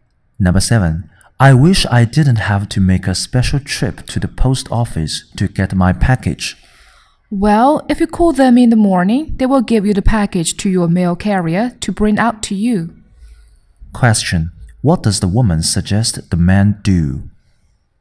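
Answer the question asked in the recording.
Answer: Call the post office in the morning so the mail carrier brings the package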